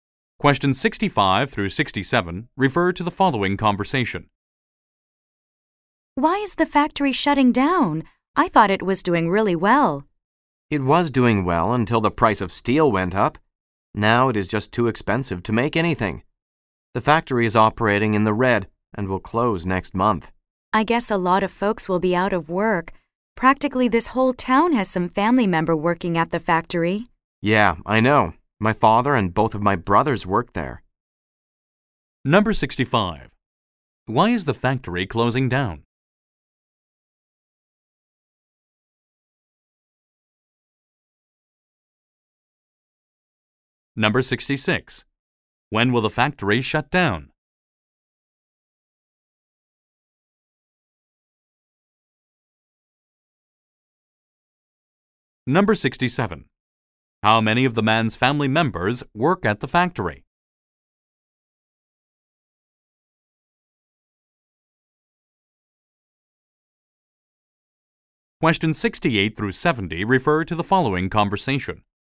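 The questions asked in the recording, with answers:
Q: Why is the factory closing down?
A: The price of steel went up

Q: When will the factory shut down?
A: Next month

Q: How many of the man's family members work at the factory?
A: Three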